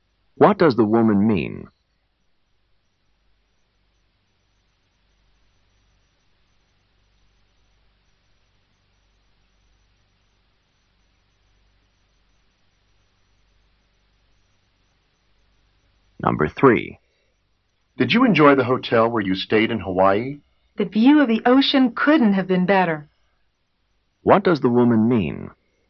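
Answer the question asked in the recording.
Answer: The ocean view was excellent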